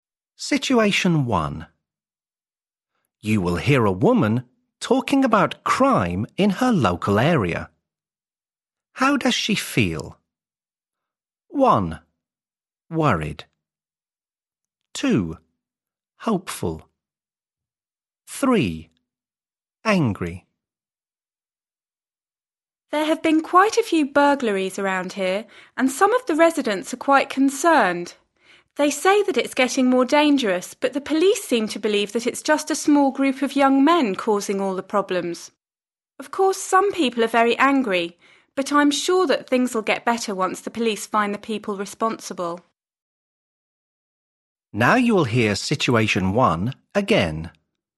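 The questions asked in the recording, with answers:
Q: How does she feel?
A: 2: Hopeful.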